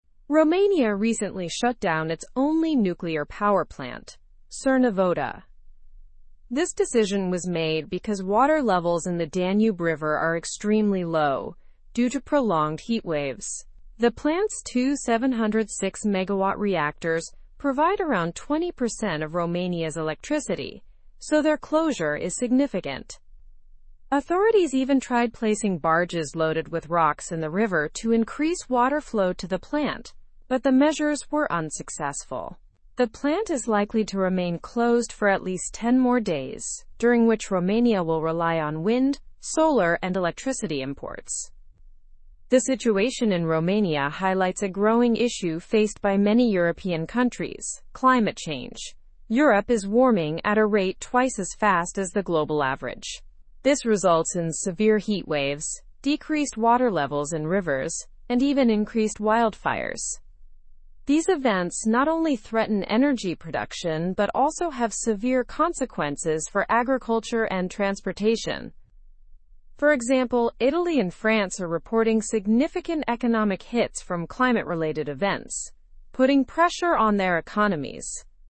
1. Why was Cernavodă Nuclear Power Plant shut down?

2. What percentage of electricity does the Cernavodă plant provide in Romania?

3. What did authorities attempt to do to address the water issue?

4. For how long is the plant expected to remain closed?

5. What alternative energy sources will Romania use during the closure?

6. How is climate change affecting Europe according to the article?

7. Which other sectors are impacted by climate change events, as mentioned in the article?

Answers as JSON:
{"1": "Due to extremely low water levels in the Danube River caused by prolonged heatwaves.", "2": "Around 20%.", "3": "They placed barges loaded with rocks in the river to try to increase water flow.", "4": "At least 10 more days.", "5": "Romania will use wind, solar, and electricity imports.", "6": "Europe is warming at a rate twice as fast as the global average, causing severe heatwaves and decreased water levels.", "7": "Agriculture and transportation sectors are affected, along with economic impacts in countries like Italy and France."}

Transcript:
Romania recently shut down its only nuclear power plant, Cernavodă. This decision was made because water levels in the Danube River are extremely low, due to prolonged heatwaves. The plant's two 706-megawatt reactors provide around 20% of Romania's electricity, so their closure is significant.
Authorities even tried placing barges loaded with rocks in the river to increase water flow to the plant, but the measures were unsuccessful. The plant is likely to remain closed for at least 10 more days, during which Romania will rely on wind, solar, and electricity imports.
The situation in Romania highlights a growing issue faced by many European countries: climate change. Europe is warming at a rate twice as fast as the global average. This results in severe heatwaves, decreased water levels in rivers, and even increased wildfires.
These events not only threaten energy production but also have severe consequences for agriculture and transportation. For example, Italy and France are reporting significant economic hits from climate-related events, putting pressure on their economies.

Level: (Level 3)